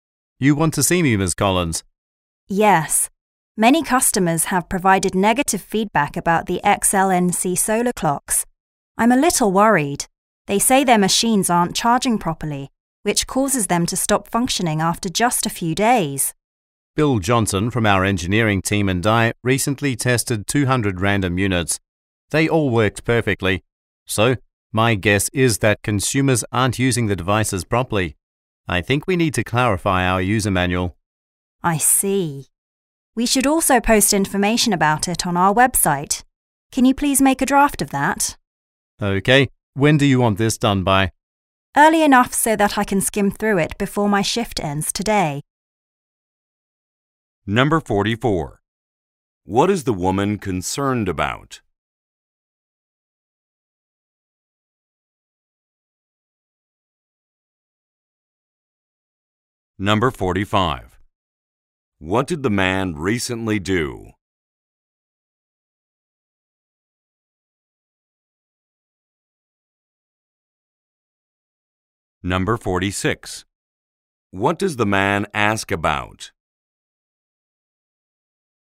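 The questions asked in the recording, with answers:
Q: What is the woman concerned about?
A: Negative customer feedback on the solar clocks

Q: What did the man recently do?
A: Tested 200 units

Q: What does the man ask about?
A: The deadline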